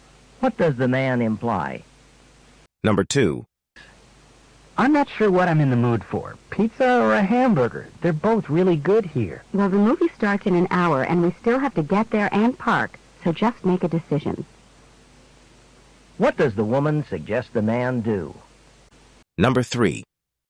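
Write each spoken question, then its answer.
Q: What does the woman suggest the man do?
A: Decide quickly what to eat so they won't be late for the movie.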